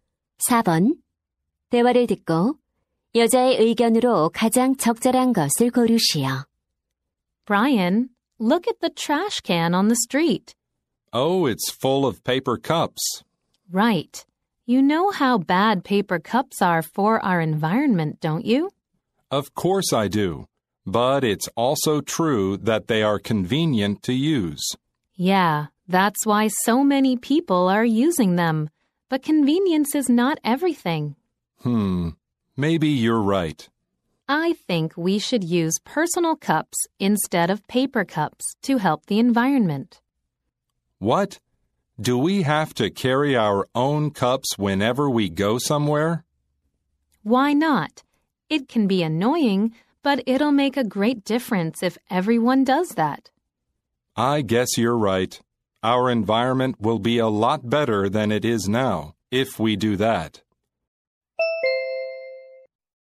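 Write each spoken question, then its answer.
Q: 대화를 듣고 여자의 의견으로 가장 적절한 것을 고르시오.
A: 환경을 위해 종이컵 대신 개인 컵을 사용해야 한다.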